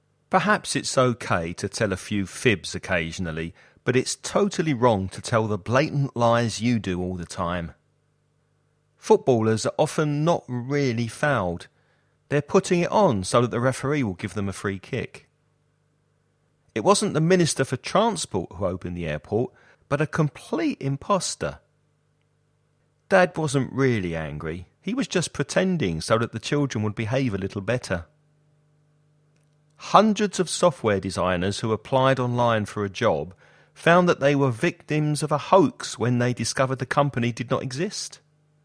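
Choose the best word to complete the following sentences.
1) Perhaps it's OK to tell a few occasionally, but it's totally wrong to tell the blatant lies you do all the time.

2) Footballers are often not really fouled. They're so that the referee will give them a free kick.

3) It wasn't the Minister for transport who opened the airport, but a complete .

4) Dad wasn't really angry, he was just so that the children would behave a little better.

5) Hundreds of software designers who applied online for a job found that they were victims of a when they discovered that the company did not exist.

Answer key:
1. fibs
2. putting it on
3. imposter
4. pretending
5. hoax

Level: Avanzado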